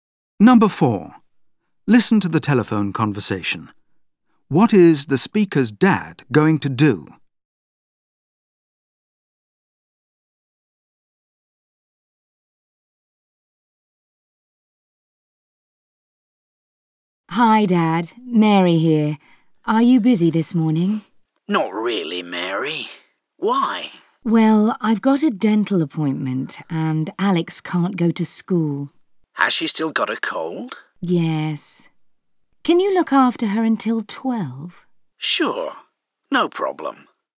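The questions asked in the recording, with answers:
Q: What is the speaker's dad going to do?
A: Look after Alex until 12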